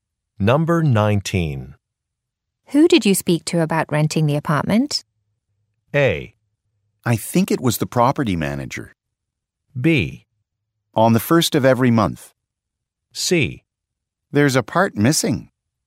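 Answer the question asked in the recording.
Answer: A: I think it was the property manager.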